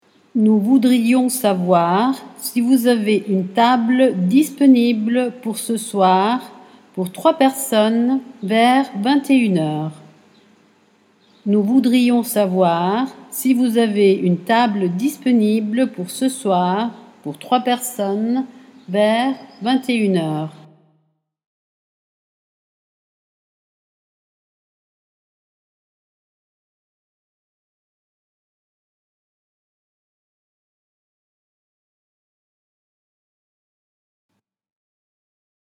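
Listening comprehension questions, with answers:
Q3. Nous une table pour 3 personnes vers 21h00.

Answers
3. voudrions savoir si vous avez / disponible pour ce soir

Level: A2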